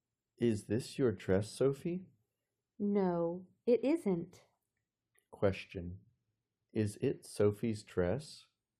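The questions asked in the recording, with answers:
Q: Is it Sophie's dress?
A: No, it isn't.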